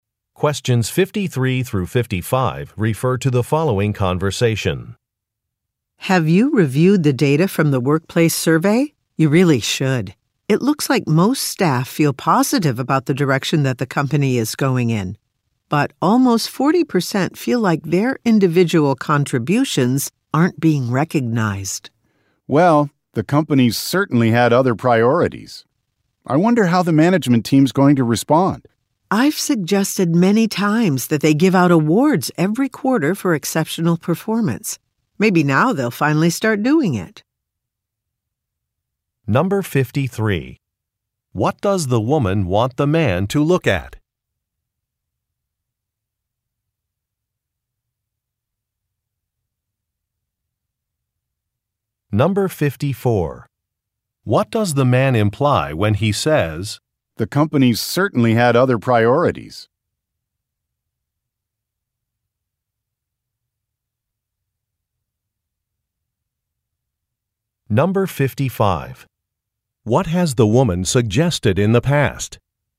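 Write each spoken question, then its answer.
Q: What does the woman want the man to look at?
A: The data from the workplace survey

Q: What has the woman suggested in the past?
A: Giving out quarterly awards for exceptional performance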